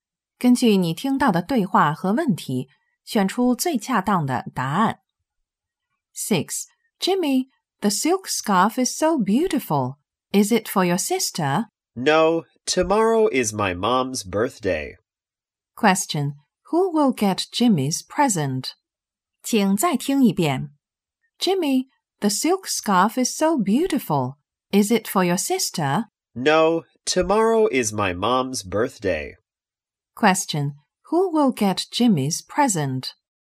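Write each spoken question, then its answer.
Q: Question, who will get Jimmy's present?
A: His mom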